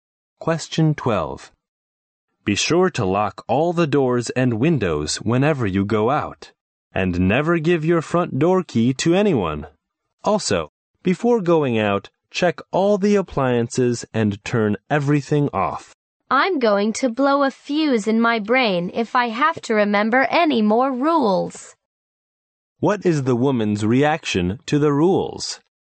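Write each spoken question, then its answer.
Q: What is the woman's reaction to the rules?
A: She feels there are too many rules to remember.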